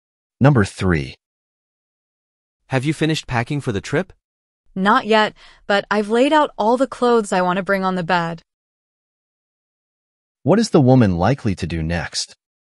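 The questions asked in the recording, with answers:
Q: What is the woman likely to do next?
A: Pack the clothes she laid out into her suitcase.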